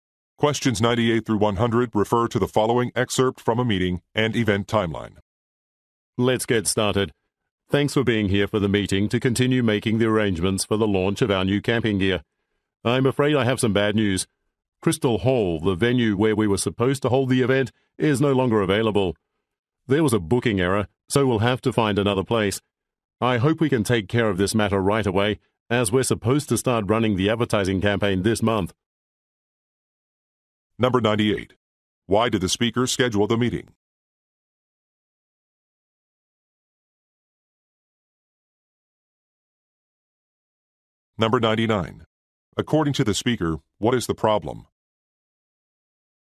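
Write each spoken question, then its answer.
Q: Why did the speaker schedule the meeting?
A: To continue arranging the launch of new camping gear

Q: According to the speaker, what is the problem?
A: The venue is no longer available due to a booking error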